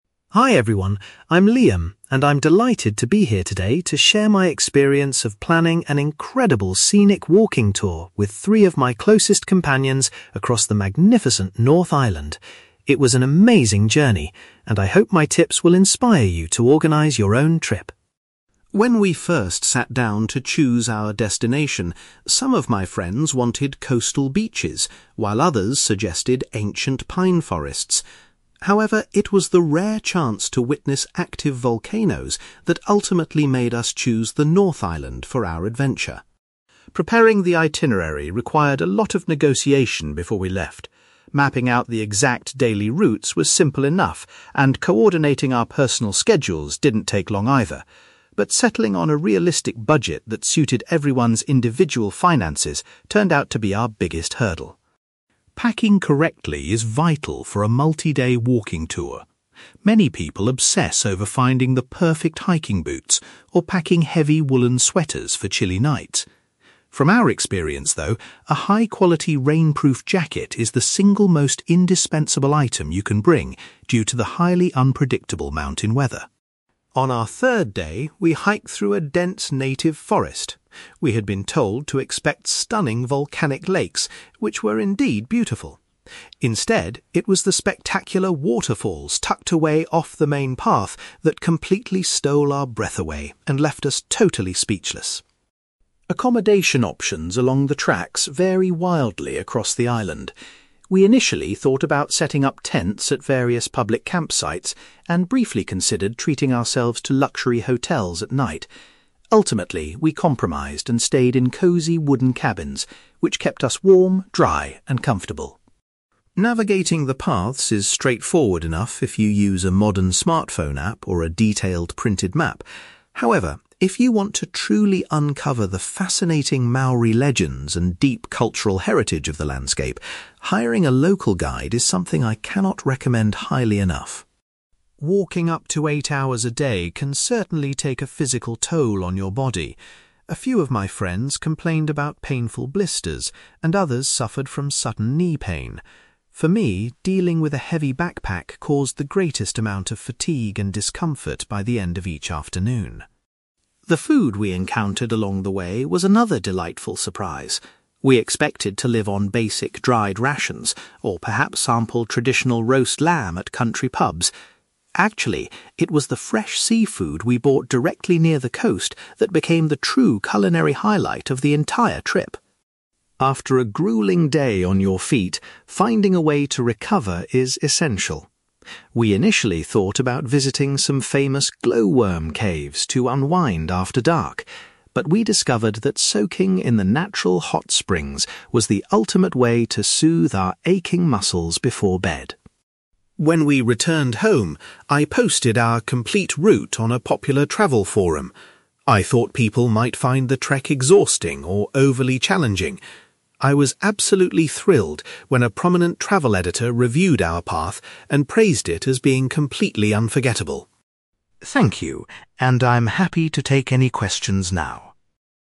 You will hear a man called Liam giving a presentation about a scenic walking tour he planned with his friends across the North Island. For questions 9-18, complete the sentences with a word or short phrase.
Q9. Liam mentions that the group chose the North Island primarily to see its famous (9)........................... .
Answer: volcanoes

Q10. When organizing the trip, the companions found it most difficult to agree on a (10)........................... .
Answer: budget

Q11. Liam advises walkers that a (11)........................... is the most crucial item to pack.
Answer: rainproof jacket

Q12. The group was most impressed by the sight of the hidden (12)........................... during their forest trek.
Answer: waterfalls

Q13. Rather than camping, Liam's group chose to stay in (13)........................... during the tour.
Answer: wooden cabins

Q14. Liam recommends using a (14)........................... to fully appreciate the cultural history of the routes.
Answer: local guide

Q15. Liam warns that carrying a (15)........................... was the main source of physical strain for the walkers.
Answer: heavy backpack

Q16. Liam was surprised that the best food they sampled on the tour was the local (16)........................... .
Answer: seafood

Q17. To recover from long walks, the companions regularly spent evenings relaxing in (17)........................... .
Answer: hot springs

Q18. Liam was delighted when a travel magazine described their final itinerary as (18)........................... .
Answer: unforgettable

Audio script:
Liam: Hi everyone, I'm Liam, and I'm delighted to be here today to share my experience of planning an incredible scenic walking tour with three of my closest companions across the magnificent North Island. It was an amazing journey, and I hope my tips will inspire you to organize your own trip.
When we first sat down to choose our destination, some of my friends wanted coastal beaches, while others suggested ancient pine forests. However, it was the rare chance to witness active volcanoes that ultimately made us choose the North Island for our adventure.
Preparing the itinerary required a lot of negotiation before we left. Mapping out the exact daily routes was simple enough, and coordinating our personal schedules didn't take long either. But settling on a realistic budget that suited everyone's individual finances turned out to be our biggest hurdle.
Packing correctly is vital for a multi-day walking tour. Many people obsess over finding the perfect hiking boots, or packing heavy woollen sweaters for chilly nights. From our experience, though, a high-quality rainproof jacket is the single most indispensable item you can bring due to the highly unpredictable mountain weather.
On our third day, we hiked through a dense native forest. We had been told to expect stunning volcanic lakes, which were indeed beautiful. Instead, it was the spectacular waterfalls tucked away off the main path that completely stole our breath away and left us totally speechless.
Accommodation options along the tracks vary wildly across the island. We initially thought about setting up tents at various public campsites, and briefly considered treating ourselves to luxury hotels at night. Ultimately, we compromised and stayed in cozy wooden cabins, which kept us warm, dry, and comfortable.
Navigating the paths is straightforward enough if you use a modern smartphone app or a detailed printed map. However, if you want to truly uncover the fascinating Maori legends and deep cultural heritage of the landscape, hiring a local guide is something I cannot recommend highly enough.
Walking up to eight hours a day can certainly take a physical toll on your body. A few of my friends complained about painful blisters, and others suffered from sudden knee pain. For me, dealing with a heavy backpack caused the greatest amount of fatigue and discomfort by the end of each afternoon.
The food we encountered along the way was another delightful surprise. We expected to live on basic dried rations, or perhaps sample traditional roast lamb at country pubs. Actually, it was the fresh seafood we bought directly near the coast that became the true culinary highlight of the entire trip.
After a grueling day on your feet, finding a way to recover is essential. We initially thought about visiting some famous glowworm caves to unwind after dark, but we discovered that soaking in the natural hot springs was the ultimate way to soothe our aching muscles before bed.
When we returned home, I posted our complete route on a popular travel forum. I thought people might find the trek exhausting or overly challenging. I was absolutely thrilled when a prominent travel editor reviewed our path and praised it as being completely unforgettable.
Thank you, and I'm happy to take any questions now.

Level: B2